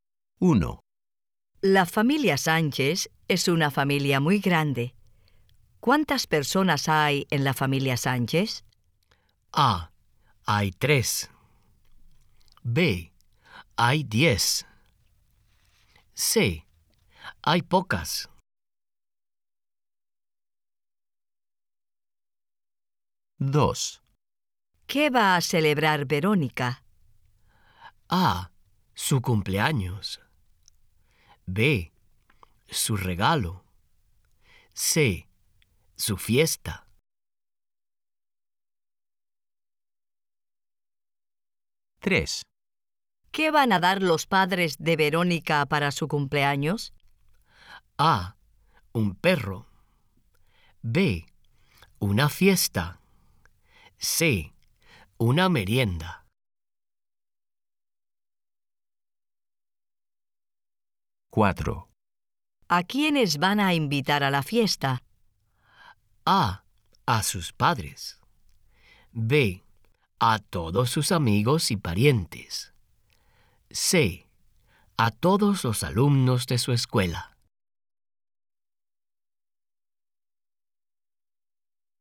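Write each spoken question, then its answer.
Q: ¿Cuántas personas hay en la familia Sánchez?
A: B: Hay 10.

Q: ¿Qué va a celebrar Verónica?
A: A: Su cumpleaños.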